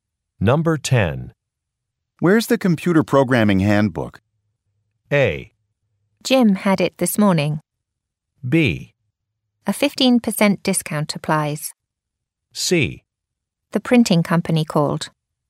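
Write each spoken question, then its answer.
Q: Where's the computer programming handbook?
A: A: Jim had it this morning.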